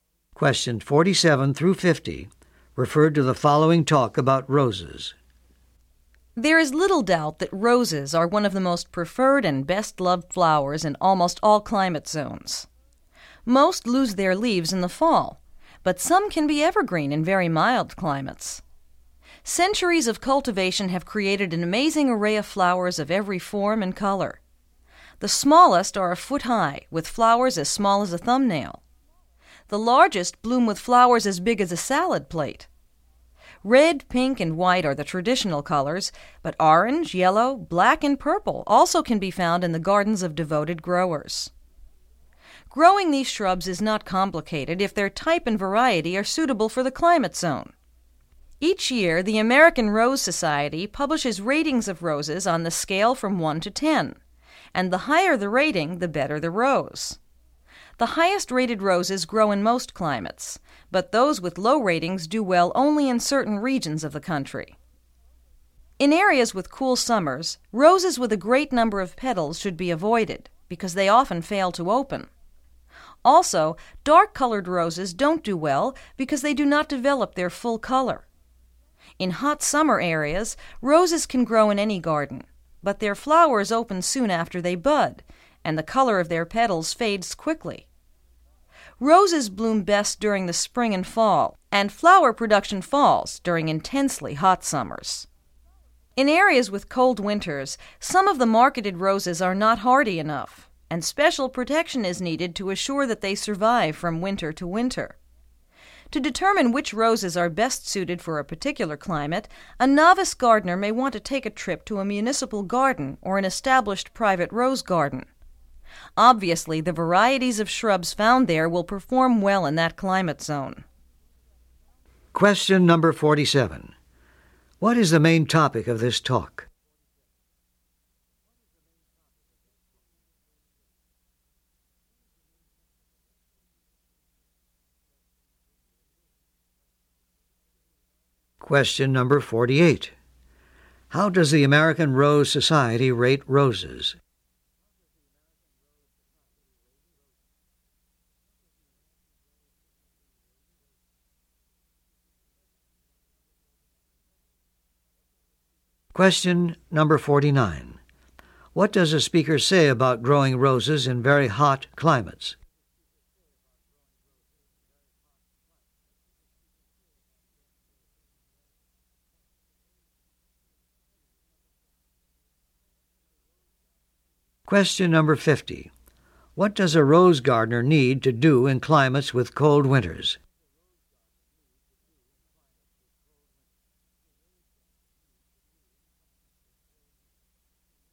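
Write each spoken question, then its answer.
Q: What is the main topic of this talk?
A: Growing roses in different climates

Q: How does the American Rose Society rate roses?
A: On a scale from 1 to 10; the higher, the better

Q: What does a speaker say about growing roses in very hot climates?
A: Flowers open soon after budding and colors fade quickly

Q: What does a rose gardener need to do in climates with cold winters?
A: Give the roses special protection to survive winter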